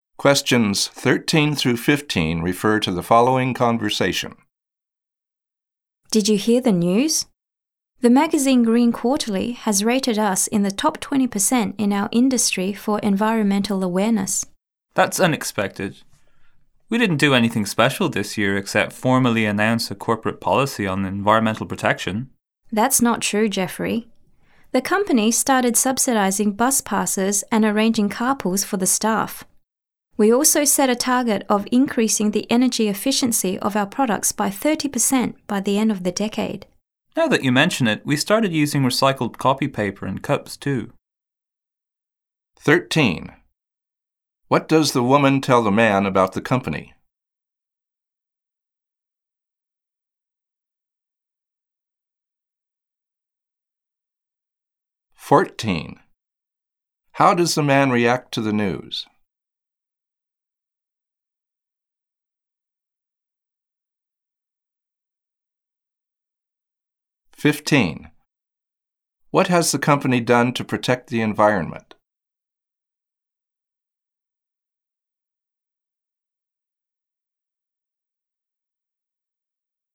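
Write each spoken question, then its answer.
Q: What does the woman tell the man about the company?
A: A magazine, Green Quarterly, rated it in the top 20% of its industry for environmental awareness

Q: How does the man react to the news?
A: He is surprised

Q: What has the company done to protect the environment?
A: It subsidized bus passes, arranged staff carpools, set energy-efficiency targets and started using recycled paper and cups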